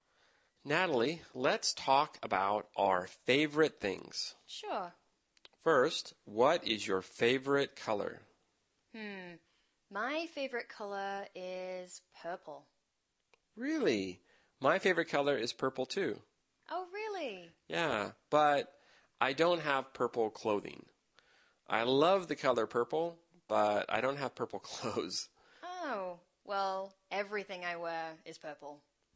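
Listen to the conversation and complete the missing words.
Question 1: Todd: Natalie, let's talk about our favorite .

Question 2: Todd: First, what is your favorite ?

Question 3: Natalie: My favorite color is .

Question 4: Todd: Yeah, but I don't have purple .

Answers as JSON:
{"1": "things", "2": "color", "3": "purple", "4": "clothing"}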